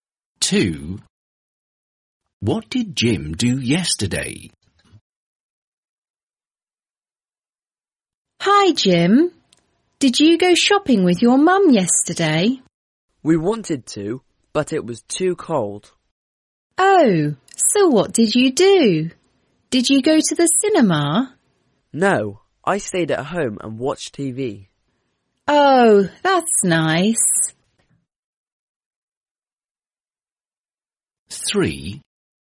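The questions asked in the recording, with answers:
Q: What did Jim do yesterday?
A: He stayed at home and watched TV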